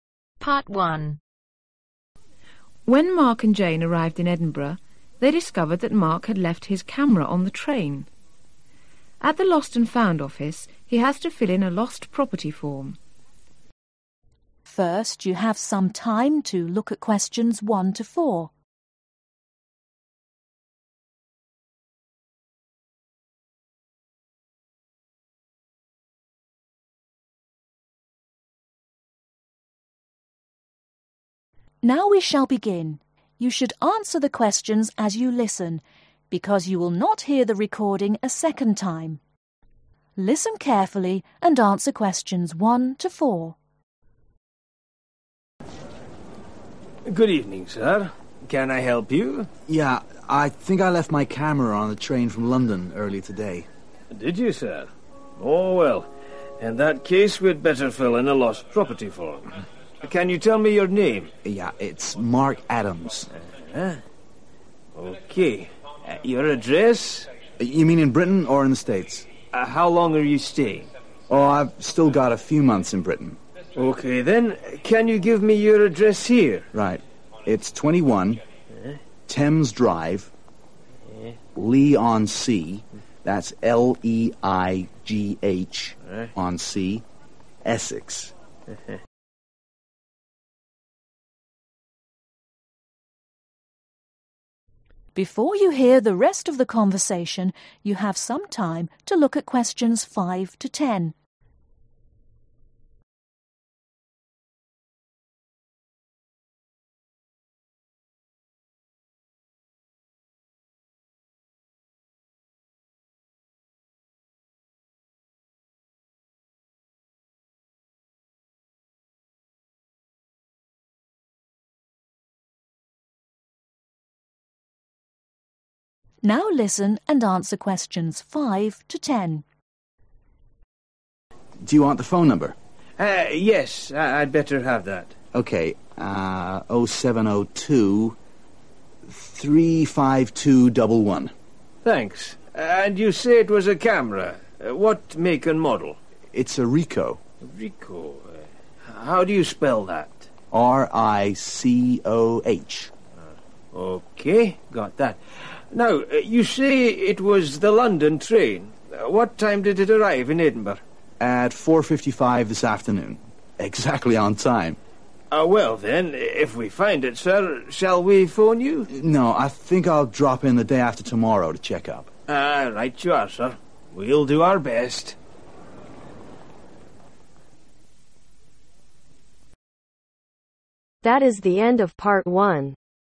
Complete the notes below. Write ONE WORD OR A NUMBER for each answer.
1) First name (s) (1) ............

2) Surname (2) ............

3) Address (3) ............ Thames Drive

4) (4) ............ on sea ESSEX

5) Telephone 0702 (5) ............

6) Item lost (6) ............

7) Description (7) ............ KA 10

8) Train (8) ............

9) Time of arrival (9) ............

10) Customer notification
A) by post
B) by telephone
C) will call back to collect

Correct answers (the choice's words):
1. Mark
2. Adams
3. 21
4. Leigh
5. 35211
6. Camera
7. Ricoh
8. London
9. 4.55 pm
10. will call back to collect